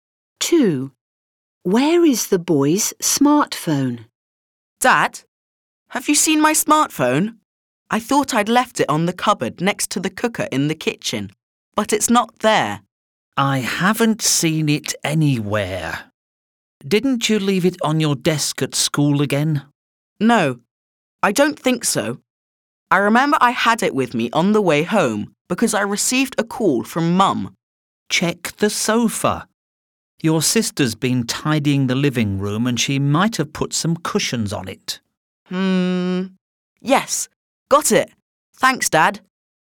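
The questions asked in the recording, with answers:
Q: Where is the boy's smartphone?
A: On the sofa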